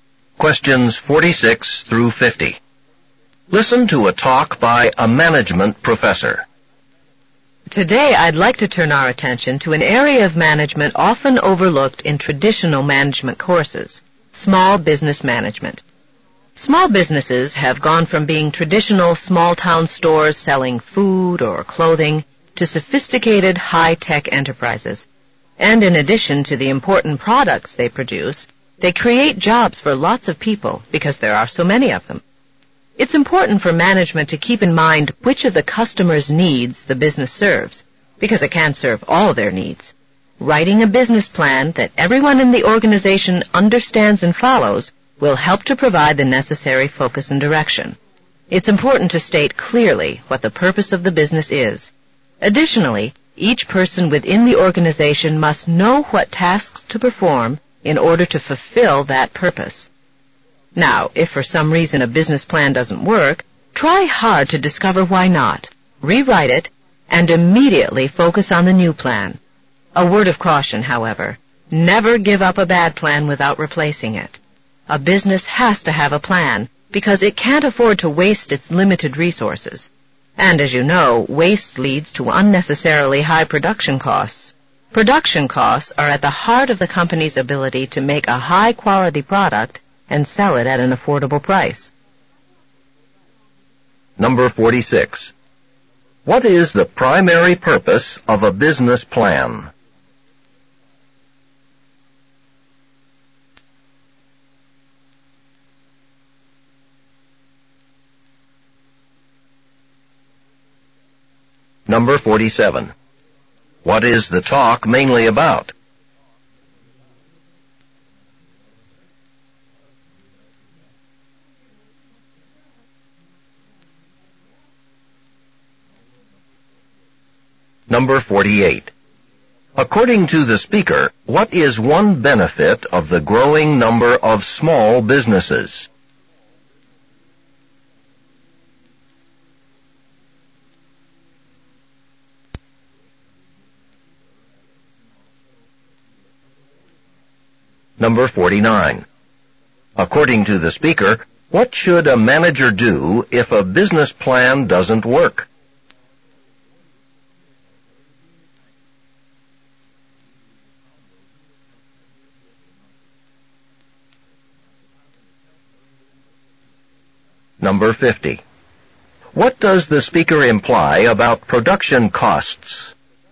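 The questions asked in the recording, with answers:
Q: What is the primary purpose of a business plan?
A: To provide focus and direction for the business

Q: What is the talk mainly about?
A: Small business management

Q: According to the speaker, what is one benefit of the growing number of small businesses?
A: They create jobs for many people

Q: According to the speaker, what should a manager do if a business plan doesn't work?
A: Find out why, rewrite it, and focus on the new plan right away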